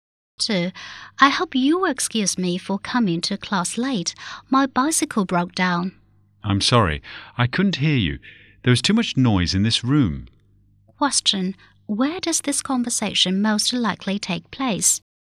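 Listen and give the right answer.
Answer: In a classroom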